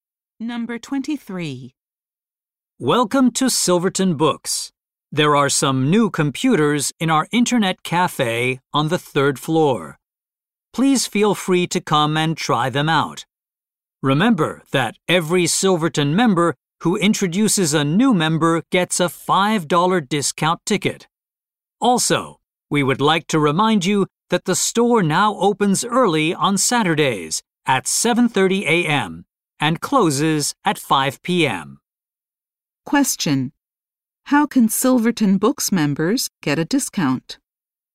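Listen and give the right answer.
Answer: By introducing a new member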